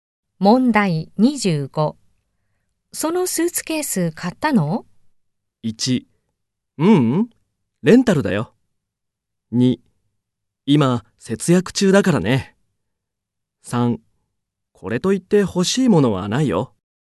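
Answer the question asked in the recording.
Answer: 1: ううん、レンタルだよ。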